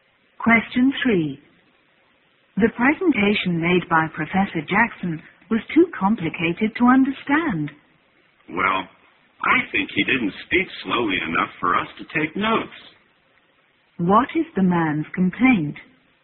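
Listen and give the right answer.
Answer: The professor spoke too fast to take notes.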